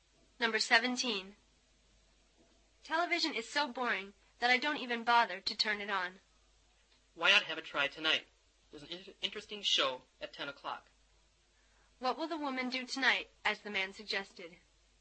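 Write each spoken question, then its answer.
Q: What will the woman do tonight, as the man suggested?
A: Watch the 10 o'clock TV show.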